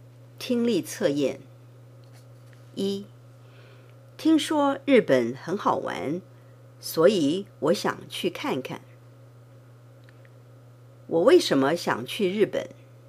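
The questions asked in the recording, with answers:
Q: 我为什么想去日本?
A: 因为听说日本很好玩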